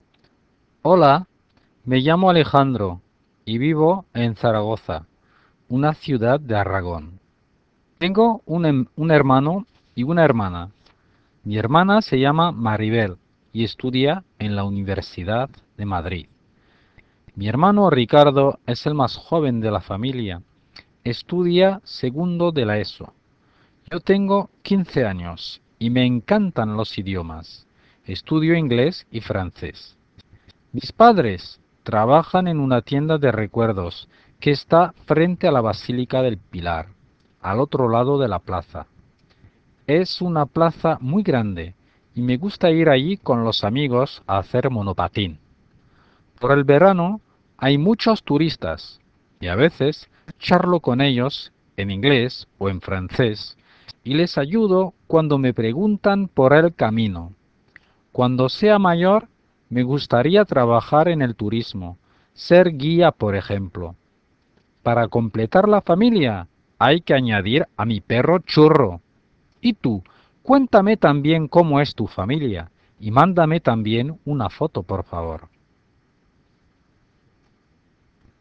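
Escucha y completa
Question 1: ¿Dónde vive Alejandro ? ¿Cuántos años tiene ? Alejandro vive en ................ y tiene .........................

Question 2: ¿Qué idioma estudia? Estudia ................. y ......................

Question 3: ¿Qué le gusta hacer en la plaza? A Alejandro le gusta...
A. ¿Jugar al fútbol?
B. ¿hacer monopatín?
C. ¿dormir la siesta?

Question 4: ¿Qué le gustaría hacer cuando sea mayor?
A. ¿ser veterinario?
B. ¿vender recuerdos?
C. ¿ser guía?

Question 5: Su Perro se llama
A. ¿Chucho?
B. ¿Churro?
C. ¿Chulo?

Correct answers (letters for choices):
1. Zaragoza; 15 años
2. inglés; francés
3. B
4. C
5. B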